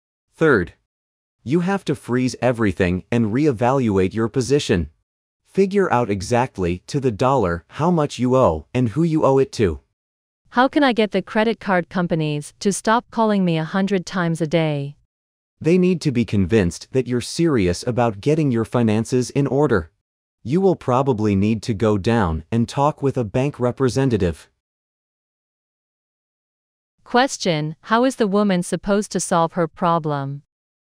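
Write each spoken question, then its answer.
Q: How is the woman supposed to solve her problem?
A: By talking with a bank representative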